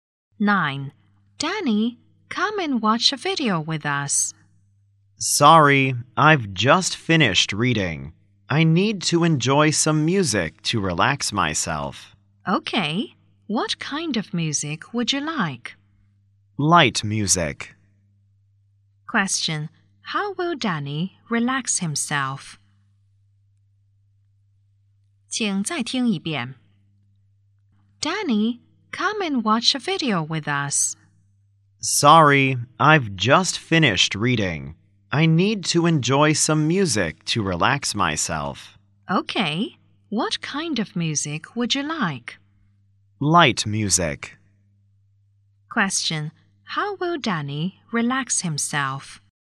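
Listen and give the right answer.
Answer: By listening to light music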